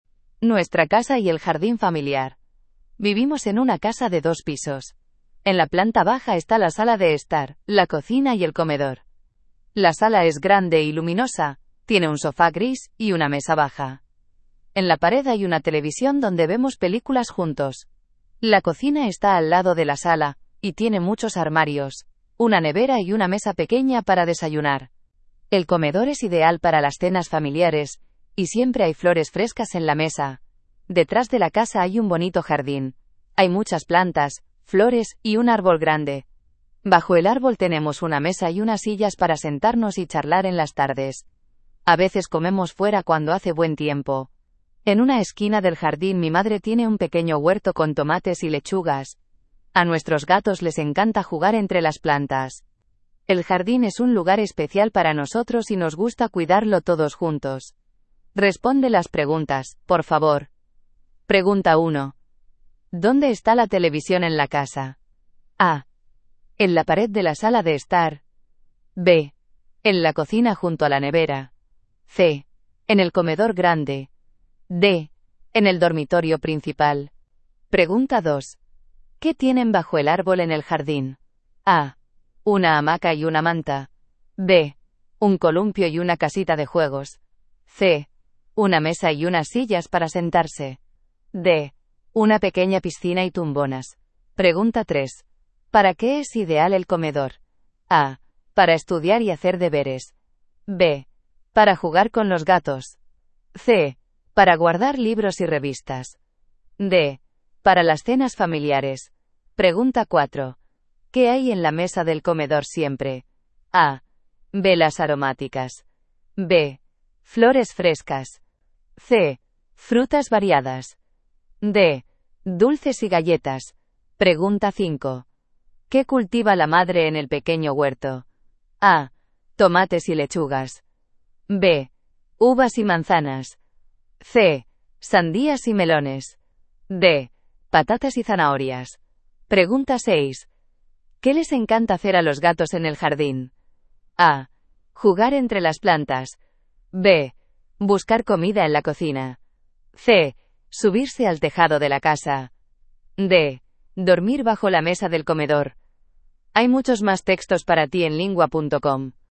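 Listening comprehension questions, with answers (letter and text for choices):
Dann beantworte die folgenden Fragen zum Text:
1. ¿Dónde está la televisión en la casa?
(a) En la pared de la sala de estar.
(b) En la cocina junto a la nevera.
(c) En el comedor grande.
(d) En el dormitorio principal.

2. ¿Qué tienen bajo el árbol en el jardín?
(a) Una hamaca y una manta.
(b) Un columpio y una casita de juegos.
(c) Una mesa y unas sillas para sentarse.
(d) Una pequeña piscina y tumbonas.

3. ¿Para qué es ideal el comedor?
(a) Para estudiar y hacer deberes.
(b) Para jugar con los gatos.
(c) Para guardar libros y revistas.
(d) Para las cenas familiares.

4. ¿Qué hay en la mesa del comedor siempre?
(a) Velas aromáticas.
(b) Flores frescas.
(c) Frutas variadas.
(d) Dulces y galletas.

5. ¿Qué cultiva la madre en el pequeño huerto?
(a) Tomates y lechugas.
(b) Uvas y manzanas.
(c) Sandías y melones.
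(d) Patatas y zanahorias.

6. ¿Qué les encanta hacer a los gatos en el jardín?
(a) Jugar entre las plantas.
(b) Buscar comida en la cocina.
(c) Subirse al tejado de la casa.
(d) Dormir bajo la mesa del comedor.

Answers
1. (a) En la pared de la sala de estar.
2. (c) Una mesa y unas sillas para sentarse.
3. (d) Para las cenas familiares.
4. (b) Flores frescas.
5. (a) Tomates y lechugas.
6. (a) Jugar entre las plantas.

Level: Basis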